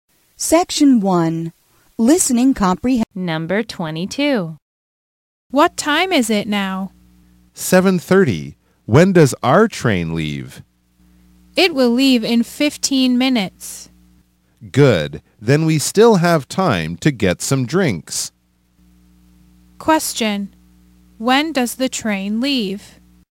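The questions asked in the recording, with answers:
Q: When does the train leave?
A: At 7:45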